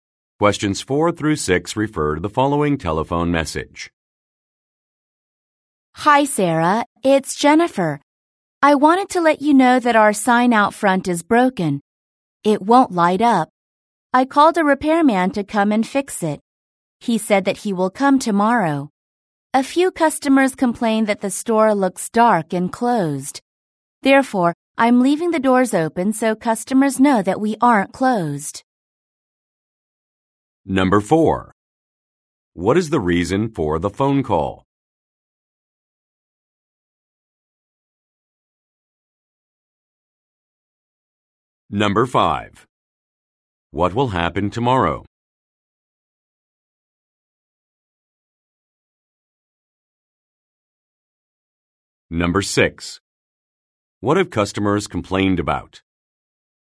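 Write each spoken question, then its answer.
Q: What is the reason for the phone call?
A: The sign out front is broken

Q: What will happen tomorrow?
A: A repairman will come to fix the sign

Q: What have customers complained about?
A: The store looks dark and closed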